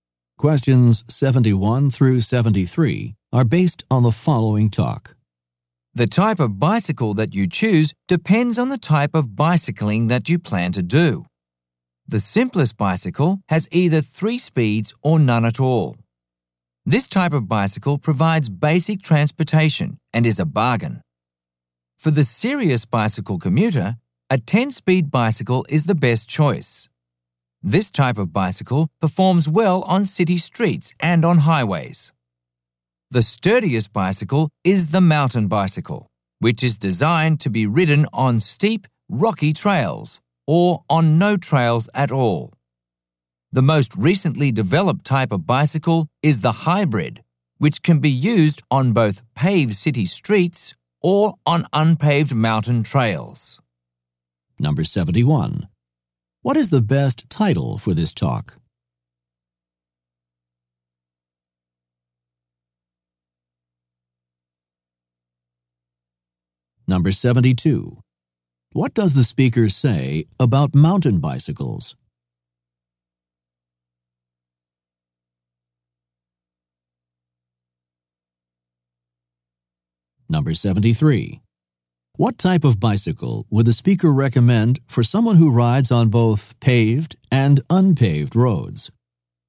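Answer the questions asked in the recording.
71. Types of bicycles / choosing a bicycle
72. They are the sturdiest, made for steep rocky trails
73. A hybrid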